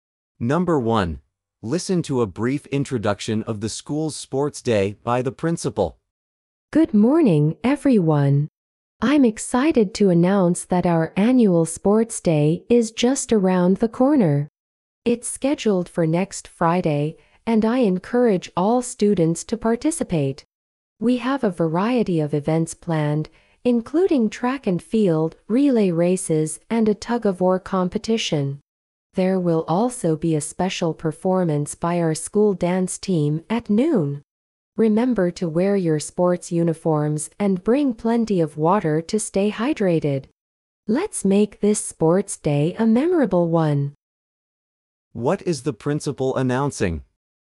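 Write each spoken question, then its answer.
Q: What is the principal announcing?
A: The school's annual sports day next Friday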